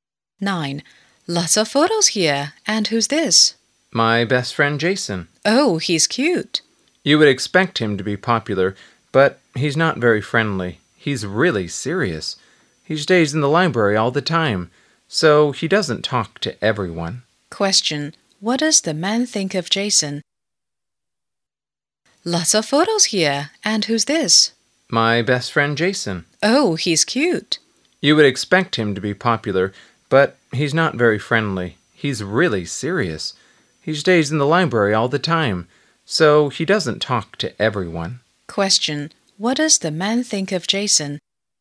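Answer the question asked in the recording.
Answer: He's serious and not very friendly.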